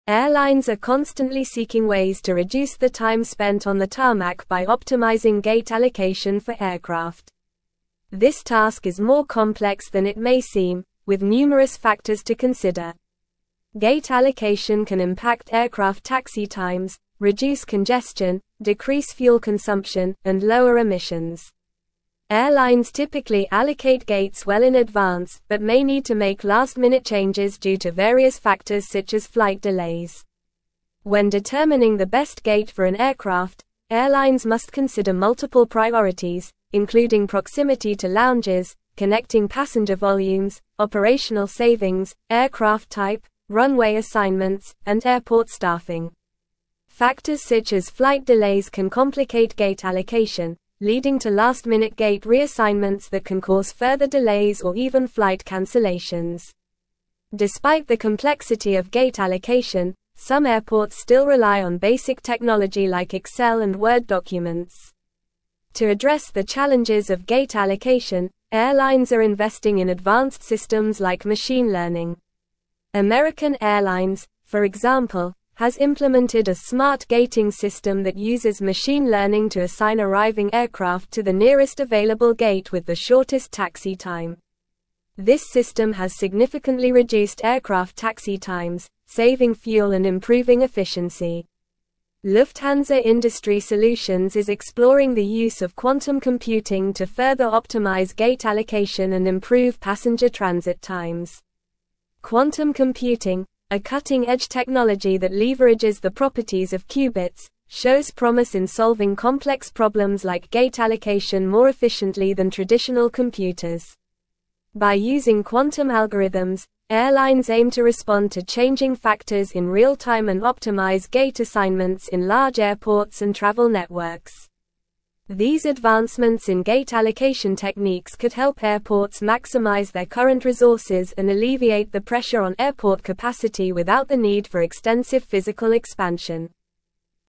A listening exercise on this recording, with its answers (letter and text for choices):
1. What are airlines constantly seeking ways to reduce by optimizing gate allocation for aircraft?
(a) Time spent in the air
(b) Time spent on the tarmac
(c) Time spent at the gate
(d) Time spent in the airport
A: (b) Time spent on the tarmac

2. What can gate allocation impact according to the article?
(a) Baggage handling, passenger check-in, security screening, and boarding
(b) In-flight services, entertainment options, seating arrangements, and cabin crew schedules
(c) Aircraft maintenance, crew rest times, catering services, and ground handling operations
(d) Aircraft taxi times, congestion, fuel consumption, and emissions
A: (d) Aircraft taxi times, congestion, fuel consumption, and emissions

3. What are some of the priorities airlines must consider when determining the best gate for an aircraft?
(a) Aircraft color, pilot experience, flight number, and departure time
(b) Proximity to lounges, connecting passenger volumes, operational savings, and aircraft type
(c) Airline profitability, gate availability, weather conditions, and flight distance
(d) Gate size, airport location, passenger nationality, and luggage weight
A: (b) Proximity to lounges, connecting passenger volumes, operational savings, and aircraft type

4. What can complicate gate allocation and lead to last-minute gate reassignments?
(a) Gate availability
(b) Passenger preferences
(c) Flight delays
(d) Airline discounts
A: (c) Flight delays

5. What technology has American Airlines implemented to optimize gate allocation?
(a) Smart Gating system using machine learning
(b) Quantum computing system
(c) Excel and Word documents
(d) Virtual reality simulation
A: (a) Smart Gating system using machine learning

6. What is Lufthansa Industry Solutions exploring to further optimize gate allocation?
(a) Quantum computing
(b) Artificial intelligence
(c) Blockchain technology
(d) Augmented reality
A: (a) Quantum computing

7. How do airlines aim to respond to changing factors in real-time according to the article?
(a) By relying on Excel and Word documents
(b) By implementing traditional computer systems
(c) By manually assigning gates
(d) By using quantum algorithms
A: (d) By using quantum algorithms

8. What could advancements in gate allocation techniques help airports achieve?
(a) Increase flight delays and cancellations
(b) Reduce passenger transit times and increase congestion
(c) Maximize current resources and alleviate pressure on airport capacity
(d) Require extensive physical expansion and increase emissions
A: (c) Maximize current resources and alleviate pressure on airport capacity

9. Airlines are constantly seeking ways to reduce the time spent on the tarmac by optimizing gate allocation for (1)______.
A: aircraft

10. This task is more complex than it may seem, with numerous (2)______ to consider.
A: factors

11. Airlines typically allocate gates well in advance but may need to make last-minute (3)______ due to various factors such as flight delays.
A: changes

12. When determining the best gate for an aircraft, (4)______ must consider multiple priorities, including proximity to lounges, connecting passenger volumes, operational savings, aircraft type, runway assignments, and airport staffing.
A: airlines

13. Factors such as (5)______ delays can complicate gate allocation, leading to last-minute gate reassignments that can cause further delays or even flight (6)______.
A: cancellations

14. Despite the (7)______ of gate allocation, some airports still rely on basic technology like Excel and Word documents.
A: complexity

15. To address the (8)______ of gate allocation, airlines are investing in advanced (9)______ like machine learning.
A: challenges

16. To address the (8)______ of gate allocation, airlines are investing in advanced (9)______ like machine learning.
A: systems

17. American (10)______, for example, has implemented a Smart Gating system that uses machine learning to assign arriving aircraft to the nearest (11)______ gate with the shortest taxi time.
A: Airlines

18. American (10)______, for example, has implemented a Smart Gating system that uses machine learning to assign arriving aircraft to the nearest (11)______ gate with the shortest taxi time.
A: available

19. This system has significantly reduced aircraft taxi times, saving fuel and (12)______ efficiency.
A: improving

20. Quantum computing, a cutting-edge technology that leverages the properties of qubits, shows promise in solving complex (13)______ like gate allocation more efficiently than traditional computers.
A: problems

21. By using quantum algorithms, airlines aim to (14)______ to changing factors in real-time and optimize gate assignments in large airports and travel networks.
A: respond

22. These (15)______ in gate allocation techniques could help airports (16)______ their current resources and alleviate the pressure on airport capacity without the need for extensive physical expansion.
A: advancements

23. These (15)______ in gate allocation techniques could help airports (16)______ their current resources and alleviate the pressure on airport capacity without the need for extensive physical expansion.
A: maximize

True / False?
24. Quantum computing does not show promise in solving complex problems like gate allocation more efficiently than traditional computers.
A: False

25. Some airports still rely on basic technology like Excel and Word documents for gate allocation.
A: True

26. Factors to consider when determining the best gate for an aircraft do not include proximity to lounges, connecting passenger volumes, and aircraft type.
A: False

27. What are some of the factors that airlines must consider when determining the best gate for an aircraft?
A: Airlines must consider factors such as proximity to lounges, connecting passenger volumes, operational savings, aircraft type, runway assignments, and airport staffing when determining the best gate for an aircraft.

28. How can flight delays complicate gate allocation for airlines?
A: Flight delays can complicate gate allocation by leading to last-minute gate reassignments, which can cause further delays or even flight cancellations.

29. What technology are some airports still relying on for gate allocation despite its complexity?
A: Some airports still rely on basic technology like Excel and Word documents for gate allocation.

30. What advantages does quantum computing offer in solving complex problems like gate allocation compared to traditional computers?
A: Quantum computing offers the advantage of solving complex problems like gate allocation more efficiently than traditional computers by leveraging the properties of qubits.

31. How do airlines aim to respond to changing factors in real-time using quantum algorithms for gate allocation?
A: Airlines aim to respond to changing factors in real-time using quantum algorithms for gate allocation by optimizing gate assignments in large airports and travel networks.

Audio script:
Airlines are constantly seeking ways to reduce the time spent on the tarmac by optimizing gate allocation for aircraft. This task is more complex than it may seem, with numerous factors to consider. Gate allocation can impact aircraft taxi times, reduce congestion, decrease fuel consumption, and lower emissions. Airlines typically allocate gates well in advance but may need to make last-minute changes due to various factors such as flight delays.
When determining the best gate for an aircraft, airlines must consider multiple priorities, including proximity to lounges, connecting passenger volumes, operational savings, aircraft type, runway assignments, and airport staffing. Factors such as flight delays can complicate gate allocation, leading to last-minute gate reassignments that can cause further delays or even flight cancellations. Despite the complexity of gate allocation, some airports still rely on basic technology like Excel and Word documents.
To address the challenges of gate allocation, airlines are investing in advanced systems like machine learning. American Airlines, for example, has implemented a Smart Gating system that uses machine learning to assign arriving aircraft to the nearest available gate with the shortest taxi time. This system has significantly reduced aircraft taxi times, saving fuel and improving efficiency. Lufthansa Industry Solutions is exploring the use of quantum computing to further optimize gate allocation and improve passenger transit times.
Quantum computing, a cutting-edge technology that leverages the properties of qubits, shows promise in solving complex problems like gate allocation more efficiently than traditional computers. By using quantum algorithms, airlines aim to respond to changing factors in real-time and optimize gate assignments in large airports and travel networks. These advancements in gate allocation techniques could help airports maximize their current resources and alleviate the pressure on airport capacity without the need for extensive physical expansion.

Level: Level 4